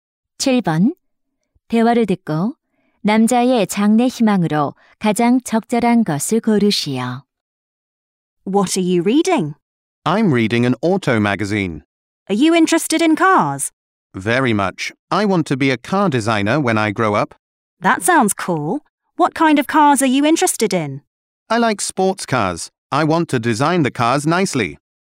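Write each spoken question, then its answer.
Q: 대화를 듣고 남자의 장래 희망으로 가장 적절한 것을 고르시오.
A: 자동차 디자이너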